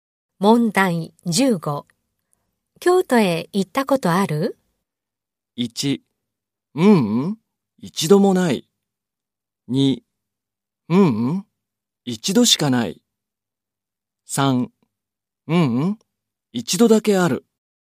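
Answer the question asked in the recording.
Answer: 1: ううん、一度もない。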